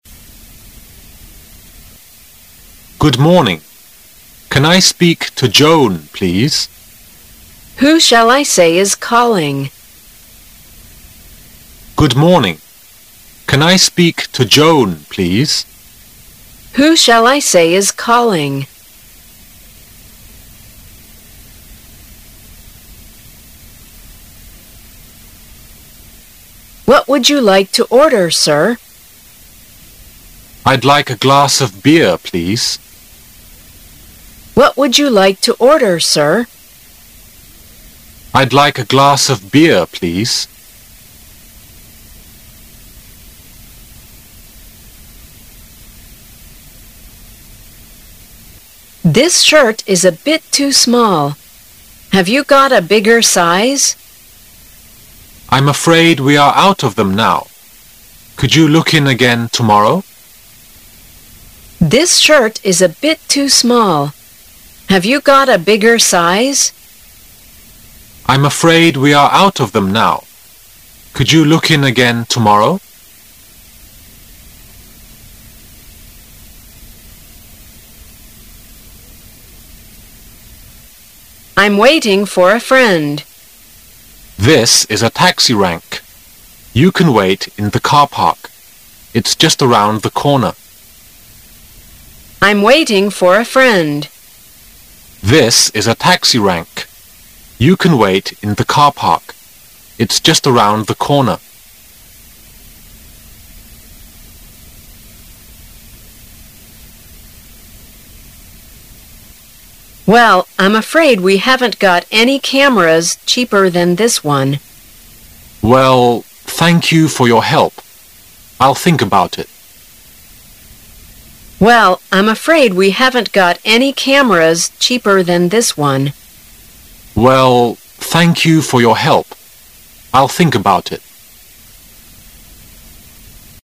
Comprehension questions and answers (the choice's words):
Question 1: What does the woman want to know?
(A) Joan is not in.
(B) She wants to know who is calling.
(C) She doesn't know whom he is calling.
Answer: She wants to know who is calling.

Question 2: Where are they talking?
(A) In a market.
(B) In a post office.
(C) In a restaurant.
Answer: In a restaurant.

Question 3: What do we know from the talk?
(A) The man is looking for a smaller shirt.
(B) It's time for the shop to close.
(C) Bigger shirts may arrive the next day.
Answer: Bigger shirts may arrive the next day.

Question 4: What did the woman do?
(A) She drove her taxi into a car park.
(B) She parked her car in a taxi park.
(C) She waited in a taxi for too long.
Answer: She parked her car in a taxi park.

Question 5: What do we know from this dialogue?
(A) The man bought a camera from this shop before.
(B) The man doesn't seem to buy the camera.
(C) The shop is out of cameras.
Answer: The man doesn't seem to buy the camera.

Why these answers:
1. M: Good morning. Can I speak to Joan, please? F: Who shall I say is calling?
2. F: What would you like to order, sir? M: I'd like a glass of beer.
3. F: This shirt is a bit too small. Have you got a bigger size? M: I'm afraid we are out of them now. Could you look in again tomorrow?
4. F: I'm waiting for a friend. M: This is a taxi tank. You can want in the car park. It's just around the corner.

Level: 公共英语一级